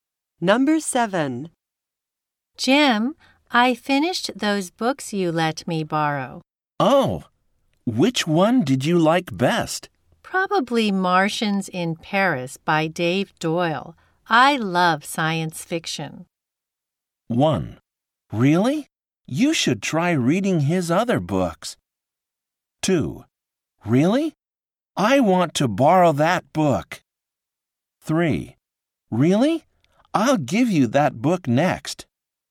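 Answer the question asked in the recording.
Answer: 1: Really? You should try reading his other books.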